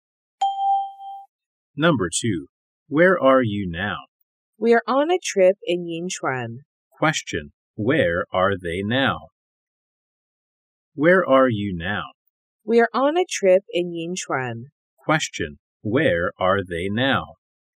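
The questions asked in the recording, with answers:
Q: Where are they now?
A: On a trip in Yinchuan.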